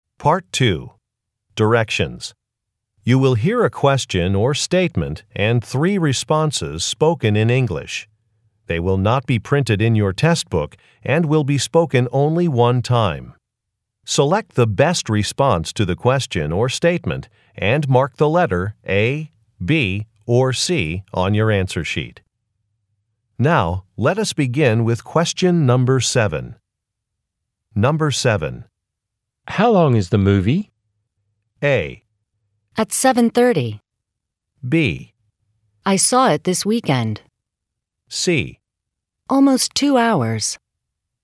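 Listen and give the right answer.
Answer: Almost 2 hours.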